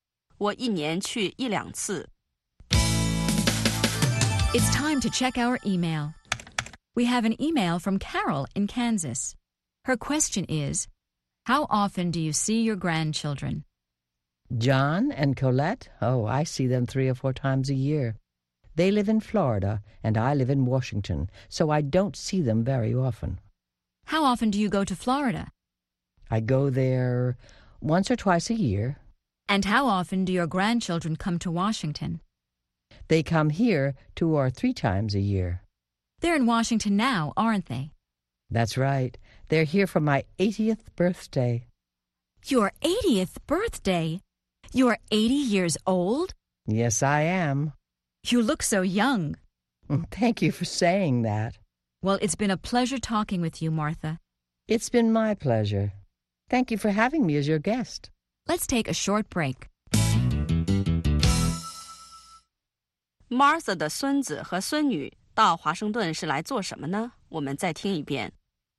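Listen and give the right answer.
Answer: 来给她过八十岁生日。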